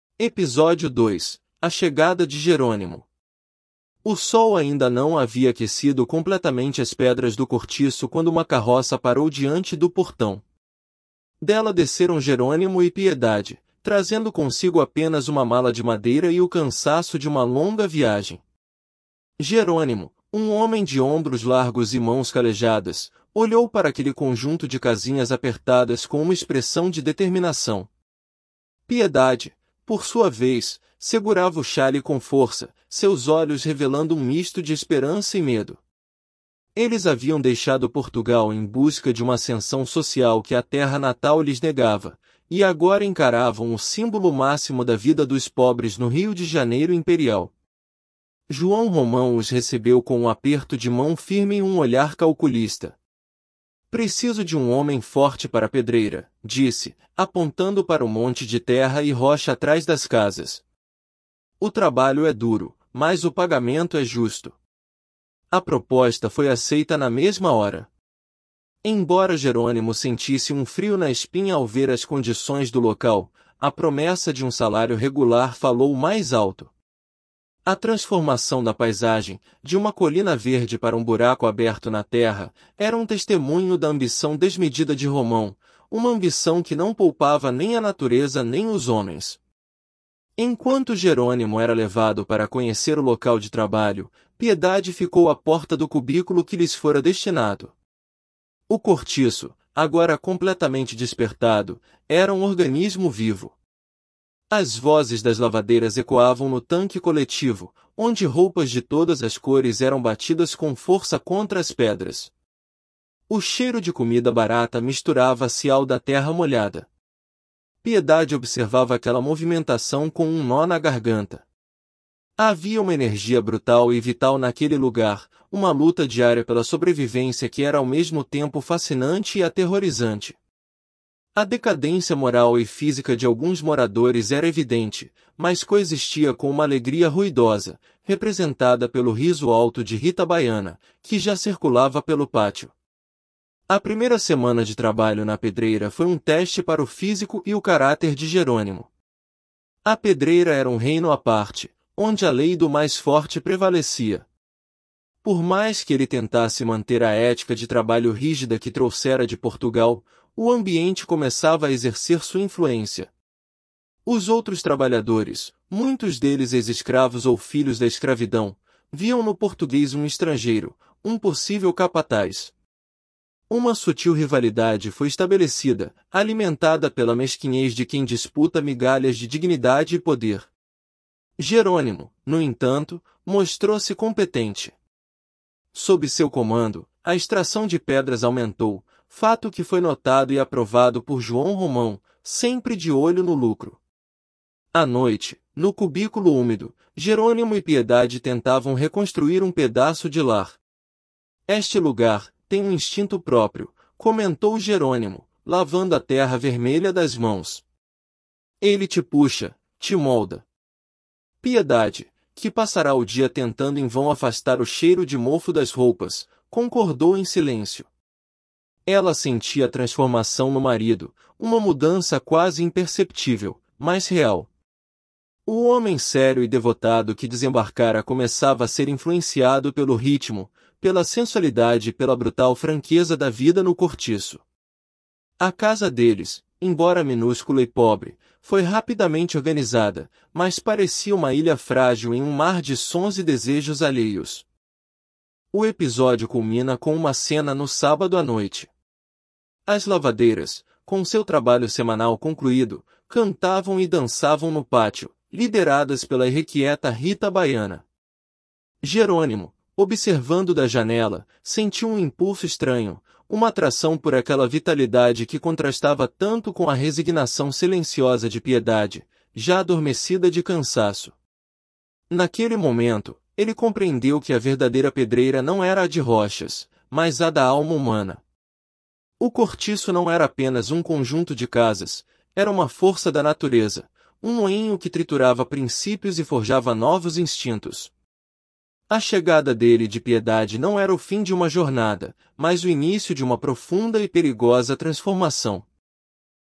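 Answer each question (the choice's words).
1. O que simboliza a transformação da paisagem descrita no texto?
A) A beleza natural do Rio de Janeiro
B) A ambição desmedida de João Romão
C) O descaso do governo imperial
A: A ambição desmedida de João Romão

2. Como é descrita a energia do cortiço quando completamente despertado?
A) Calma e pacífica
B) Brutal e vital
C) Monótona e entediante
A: Brutal e vital

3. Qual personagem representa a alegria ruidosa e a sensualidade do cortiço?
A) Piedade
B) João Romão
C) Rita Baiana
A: Rita Baiana

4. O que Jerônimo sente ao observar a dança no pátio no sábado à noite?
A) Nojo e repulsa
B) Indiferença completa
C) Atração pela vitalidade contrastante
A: Atração pela vitalidade contrastante

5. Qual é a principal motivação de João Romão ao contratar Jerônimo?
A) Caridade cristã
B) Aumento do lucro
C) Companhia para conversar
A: Aumento do lucro

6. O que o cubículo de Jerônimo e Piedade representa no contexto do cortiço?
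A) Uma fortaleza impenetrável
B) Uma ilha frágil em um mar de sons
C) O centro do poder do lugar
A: Uma ilha frágil em um mar de sons

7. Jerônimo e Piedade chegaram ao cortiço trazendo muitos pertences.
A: Falso

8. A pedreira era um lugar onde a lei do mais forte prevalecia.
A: Verdadeiro

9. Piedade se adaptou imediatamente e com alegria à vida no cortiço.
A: Falso

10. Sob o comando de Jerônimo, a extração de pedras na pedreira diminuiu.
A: Falso

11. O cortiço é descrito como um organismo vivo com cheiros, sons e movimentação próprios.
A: Verdadeiro

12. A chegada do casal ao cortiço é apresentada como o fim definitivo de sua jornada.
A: Falso

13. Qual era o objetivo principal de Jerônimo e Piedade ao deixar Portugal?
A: Buscar uma ascensão social que a terra natal lhes negava

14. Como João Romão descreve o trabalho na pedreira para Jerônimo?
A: O trabalho é duro, mas o pagamento é justo

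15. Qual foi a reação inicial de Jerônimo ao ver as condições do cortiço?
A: Sentiu um frio na espinha

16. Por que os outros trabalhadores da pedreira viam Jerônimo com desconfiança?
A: Viam nele um estrangeiro, um possível capataz

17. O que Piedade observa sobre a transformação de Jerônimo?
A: Uma mudança quase imperceptível, mas real: ele começava a ser influenciado pelo ritmo, pela sensualidade e pela franqueza do cortiço

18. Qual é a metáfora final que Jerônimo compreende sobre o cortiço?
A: A verdadeira pedreira não era a de rochas, mas a da alma humana

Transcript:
Episódio 2: A Chegada de Jerônimo – TEST
O sol ainda não havia aquecido completamente as pedras do cortiço quando uma carroça parou diante do portão. Dela desceram Jerônimo e Piedade, trazendo consigo apenas uma mala de madeira e o cansaço de uma longa viagem. Jerônimo, um homem de ombros largos e mãos calejadas, olhou para aquele conjunto de casinhas apertadas com uma expressão de determinação. 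Piedade, por sua vez, segurava o xale com força, seus olhos revelando um misto de esperança e medo. Eles haviam deixado Portugal em busca de uma ascensão social que a terra natal lhes negava, e agora encaravam o símbolo máximo da vida dos pobres no Rio de Janeiro imperial.
João Romão os recebeu com um aperto de mão firme e um olhar calculista. 'Preciso de um homem forte para a pedreira', disse, apontando para o monte de terra e rocha atrás das casas. 'O trabalho é duro, mas o pagamento é justo.' A proposta foi aceita na mesma hora. Embora Jerônimo sentisse um frio na espinha ao ver as condições do local, a promessa de um salário regular falou mais alto. A transformação da paisagem – de uma colina verde para um buraco aberto na terra – era um testemunho da ambição desmedida de Romão, uma ambição que não poupava nem a natureza nem os homens.
Enquanto Jerônimo era levado para conhecer o local de trabalho, Piedade ficou à porta do cubículo que lhes fora destinado. 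O cortiço, agora completamente despertado, era um organismo vivo. As vozes das lavadeiras ecoavam no tanque coletivo, onde roupas de todas as cores eram batidas com força contra as pedras. O cheiro de comida barata misturava-se ao da terra molhada. Piedade observava aquela movimentação com um nó na garganta. Havia uma energia brutal e vital naquele lugar, uma luta diária pela sobrevivência que era ao mesmo tempo fascinante e aterrorizante. A decadência moral e física de alguns moradores era evidente, mas coexistia com uma alegria ruidosa, representada pelo riso alto de Rita Baiana, que já circulava pelo pátio.
A primeira semana de trabalho na pedreira foi um teste para o físico e o caráter de Jerônimo. A pedreira era um reino à parte, onde a lei do mais forte prevalecia. Por mais que ele tentasse manter a ética de trabalho rígida que trouxera de Portugal, o ambiente começava a exercer sua influência. 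Os outros trabalhadores, muitos deles ex-escravos ou filhos da escravidão, viam no português um estrangeiro, um possível capataz. Uma sutil rivalidade foi estabelecida, alimentada pela mesquinhez de quem disputa migalhas de dignidade e poder. Jerônimo, no entanto, mostrou-se competente. Sob seu comando, a extração de pedras aumentou, fato que foi notado e aprovado por João Romão, sempre de olho no lucro.
À noite, no cubículo úmido, Jerônimo e Piedade tentavam reconstruir um pedaço de lar. 'Este lugar... tem um instinto próprio', comentou Jerônimo, lavando a terra vermelha das mãos. 'Ele te puxa, te molda.' Piedade, que passara o dia tentando em vão afastar o cheiro de mofo das roupas, concordou em silêncio. Ela sentia a transformação no marido, uma mudança quase imperceptível, mas real. O homem sério e devotado que desembarcara começava a ser influenciado pelo ritmo, pela sensualidade e pela brutal franqueza da vida no cortiço. 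A casa deles, embora minúscula e pobre, foi rapidamente organizada, mas parecia uma ilha frágil em um mar de sons e desejos alheios.
O episódio culmina com uma cena no sábado à noite. As lavadeiras, com seu trabalho semanal concluído, cantavam e dançavam no pátio, lideradas pela irrequieta Rita Baiana. Jerônimo, observando da janela, sentiu um impulso estranho, uma atração por aquela vitalidade que contrastava tanto com a resignação silenciosa de Piedade, já adormecida de cansaço. Naquele momento, ele compreendeu que a verdadeira pedreira não era a de rochas, mas a da alma humana. O cortiço não era apenas um conjunto de casas; era uma força da natureza, um moinho que triturava princípios e forjava novos instintos. A chegada dele e de Piedade não era o fim de uma jornada, mas o início de uma profunda e perigosa transformação.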